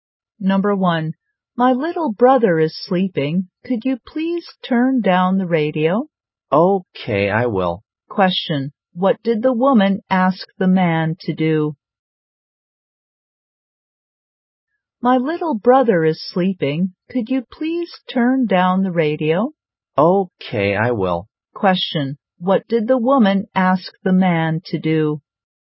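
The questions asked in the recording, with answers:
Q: Question, what did the woman ask the man to do?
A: Turn down the radio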